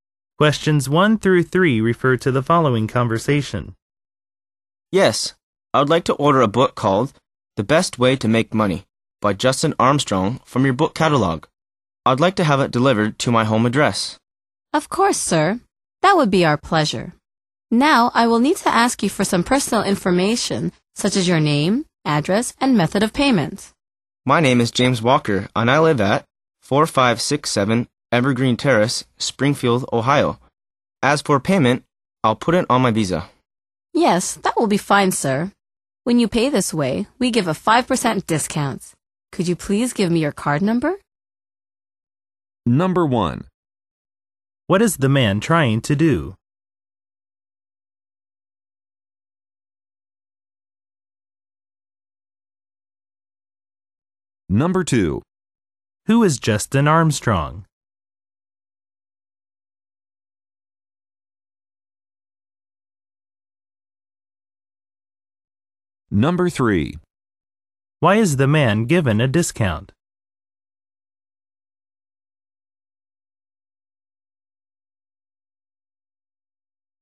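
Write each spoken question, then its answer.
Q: What is the man trying to do?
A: Order a book from a catalog

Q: Who is Justin Armstrong?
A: The author of the book

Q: Why is the man given a discount?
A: Because he pays by credit card (Visa)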